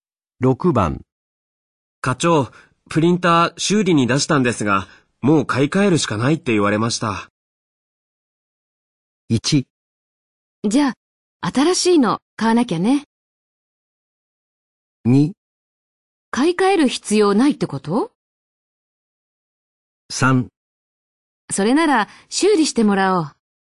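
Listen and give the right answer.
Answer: 1: じゃあ、新しいの買わなきゃね。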